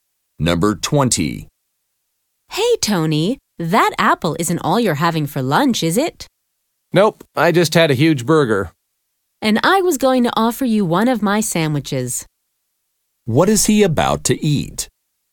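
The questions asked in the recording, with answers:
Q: What is he about to eat?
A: An apple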